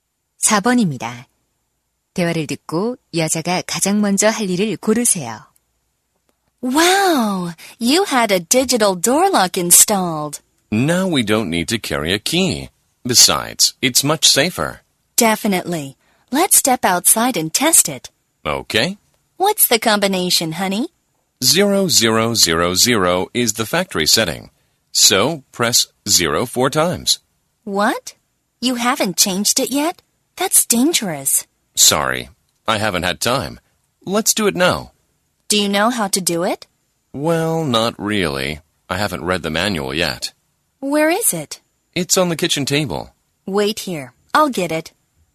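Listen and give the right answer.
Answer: 도어록 설명서 가져오기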